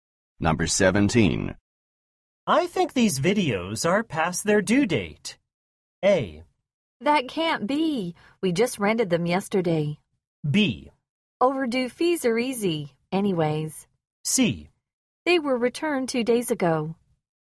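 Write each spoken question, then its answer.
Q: I think these videos are past their due date.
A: A: That can't be. We just rented them yesterday.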